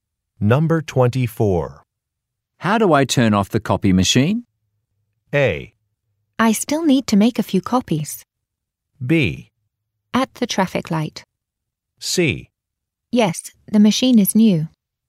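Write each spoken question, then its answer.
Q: How do I turn off the copy machine?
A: A: I still need to make a few copies.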